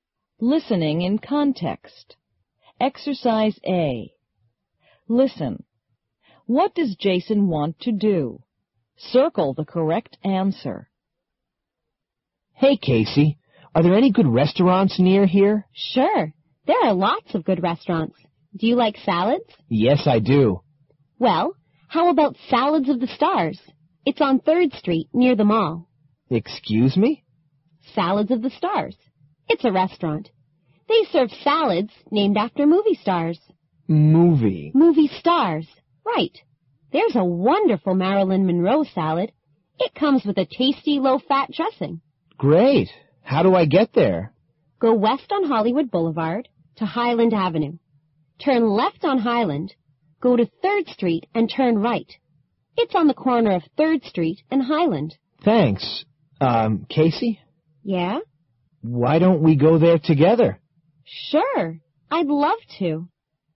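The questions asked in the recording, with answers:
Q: What does Jason want to do?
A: Go to a restaurant (Salads of the Stars) with Casey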